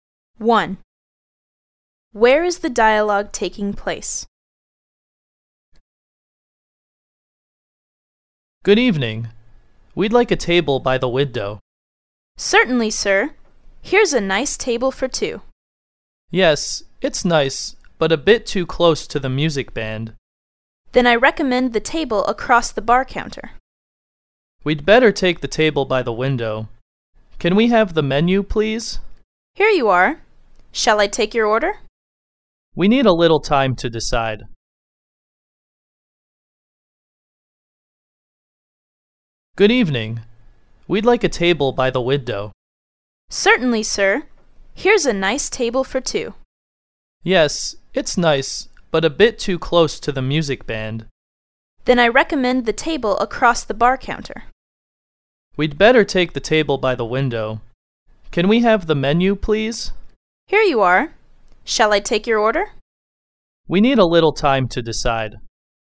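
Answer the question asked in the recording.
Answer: In a restaurant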